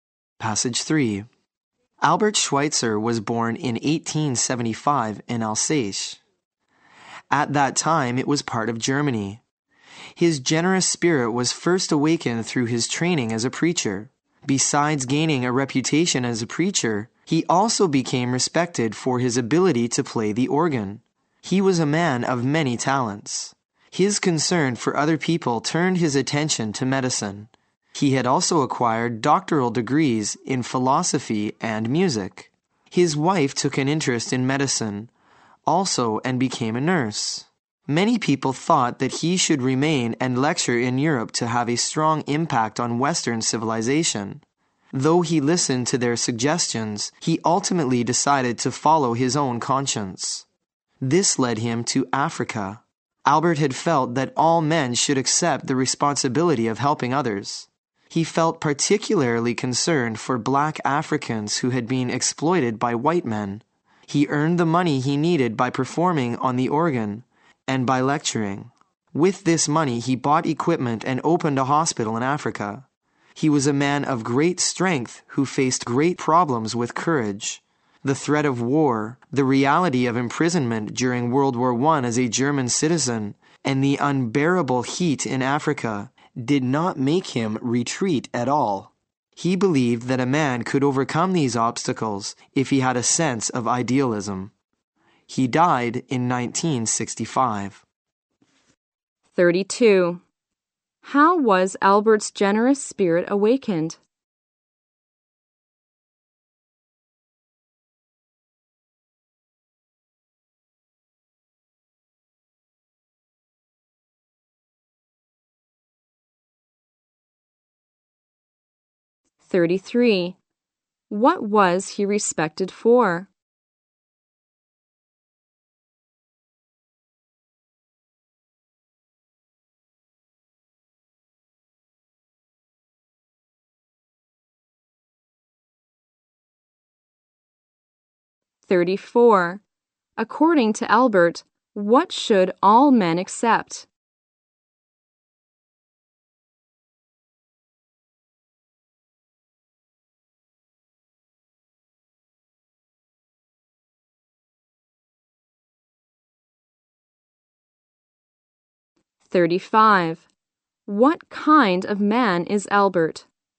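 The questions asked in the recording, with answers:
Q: How was Albert's generous spirit awakened?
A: Through his training as a preacher

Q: What was he respected for?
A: His ability to play the organ

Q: According to Albert, what should all men accept?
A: The responsibility of helping others

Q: What kind of man is Albert?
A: A man of great strength and courage with many talents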